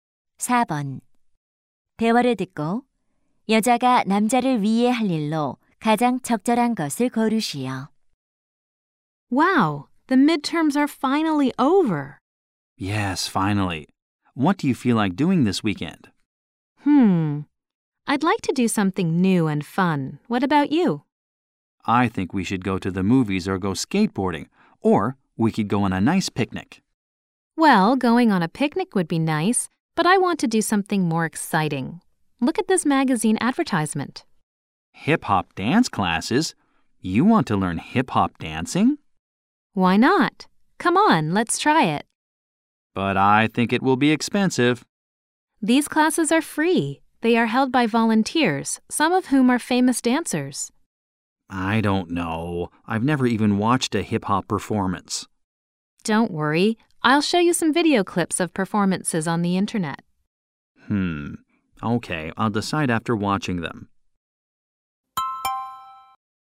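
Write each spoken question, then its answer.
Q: 대화를 듣고 여자가 남자를 위해 할 일로 가장 적절한 것을 고르시오.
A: 인터넷에서 힙합 공연 영상 보여주기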